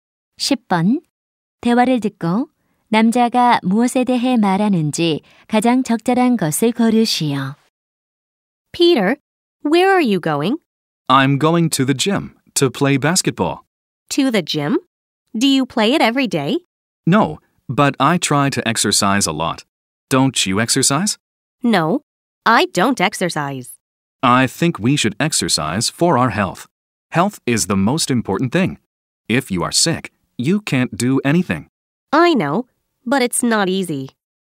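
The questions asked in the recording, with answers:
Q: 대화를 듣고 남자가 무엇에 대해 말하는지 가장 적절한 것을 고르시오.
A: 건강을 위한 운동의 중요성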